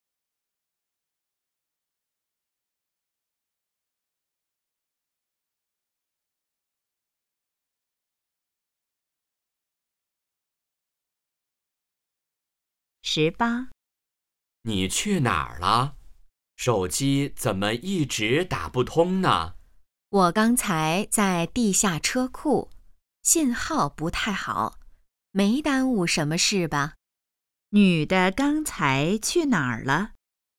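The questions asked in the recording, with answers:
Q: 女的刚才去哪儿了?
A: 地下车库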